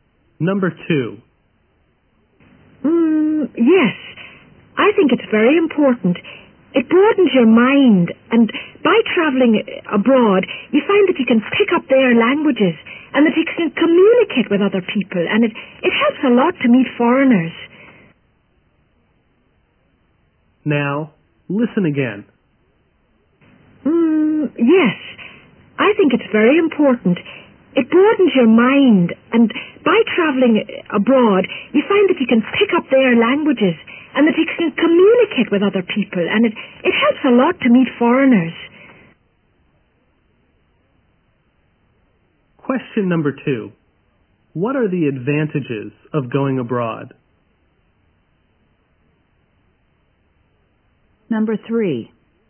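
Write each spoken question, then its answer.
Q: What are the advantages of going abroad?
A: It broadens your mind; you can pick up languages, communicate with other people and meet foreigners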